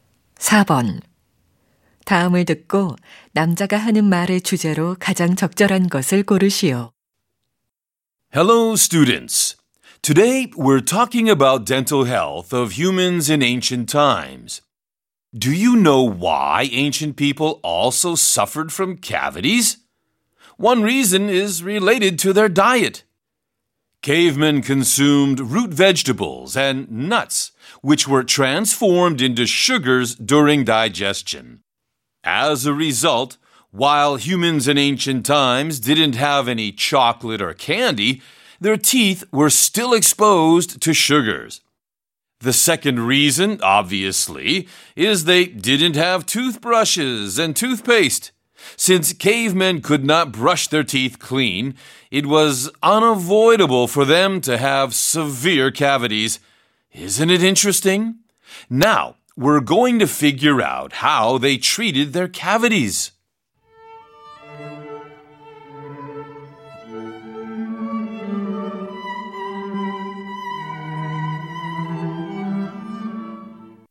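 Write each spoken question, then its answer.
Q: 다음을 듣고 남자가 하는 말의 주제로 가장 적절한 것을 고르시오.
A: 고대인들이 충치를 앓았던 이유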